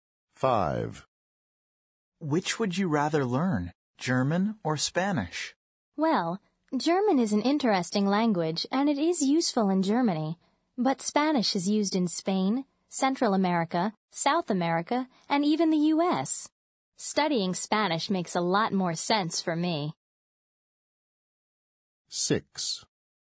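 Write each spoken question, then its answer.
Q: Which would you rather learn, German or Spanish?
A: Spanish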